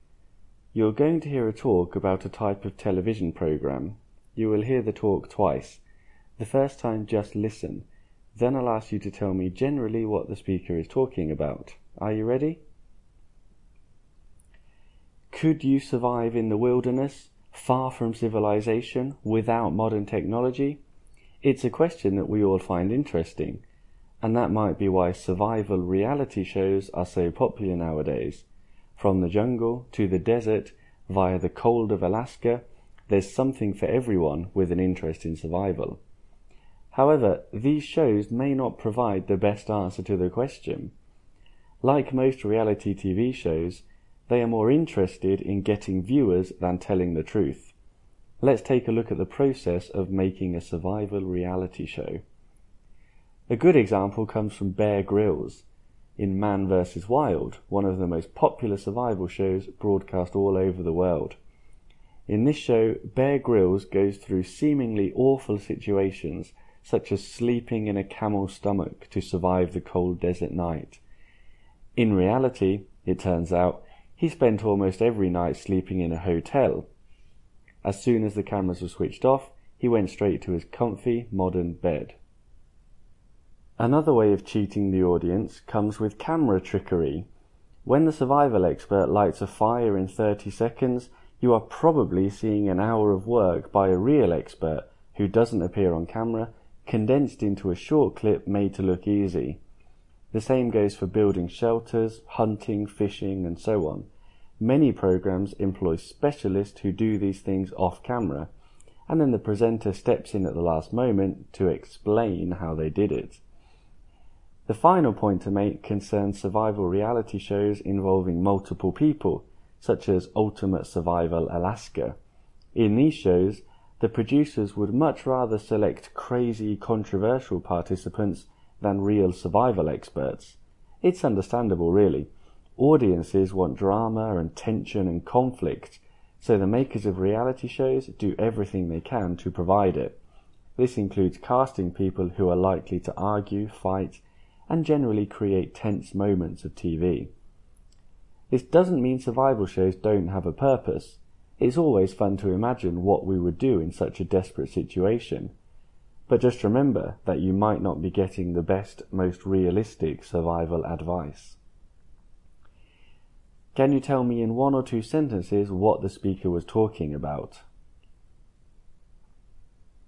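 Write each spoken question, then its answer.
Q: Can you tell me in one or two sentences what the speaker was talking about?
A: Survival reality TV shows are popular but not realistic: they fake hardships, use hidden experts and camera tricks, and choose dramatic participants over real experts.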